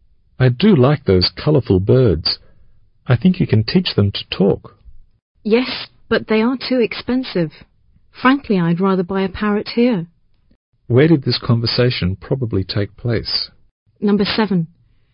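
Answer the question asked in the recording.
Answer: In a pet shop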